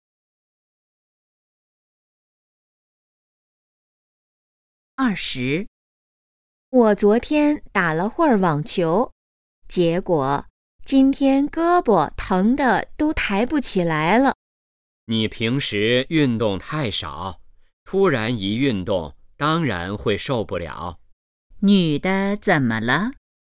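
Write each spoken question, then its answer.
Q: 女的怎么了?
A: 胳膊疼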